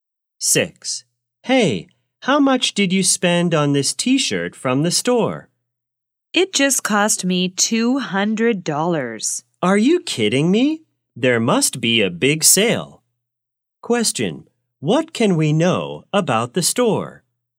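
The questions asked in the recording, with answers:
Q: What can we know about the store?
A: It is having a big sale.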